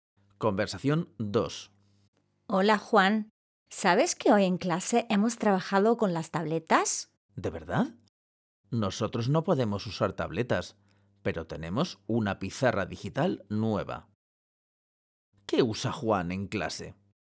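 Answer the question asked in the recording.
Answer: una pizarra digital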